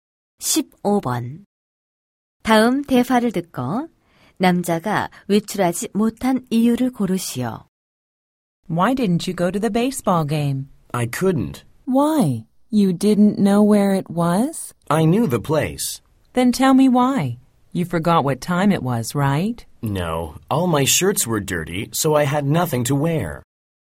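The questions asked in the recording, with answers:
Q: 다음 대화를 듣고 남자가 외출하지 못한 이유를 고르시오.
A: 셔츠가 모두 더러워서 입을 옷이 없어서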